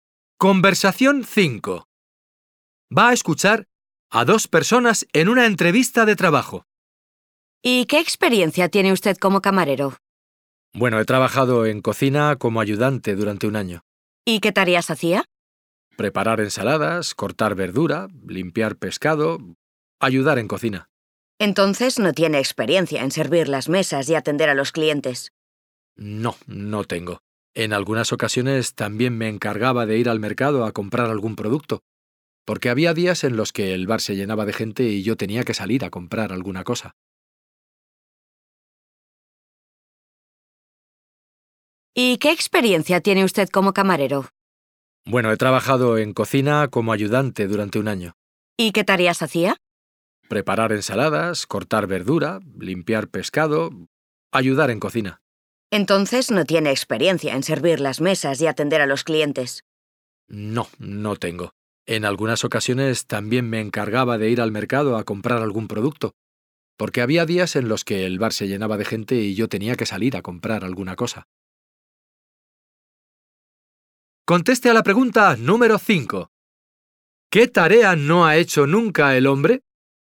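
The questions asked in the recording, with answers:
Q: ¿Qué tarea no ha hecho nunca el hombre?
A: Servir las mesas y atender a los clientes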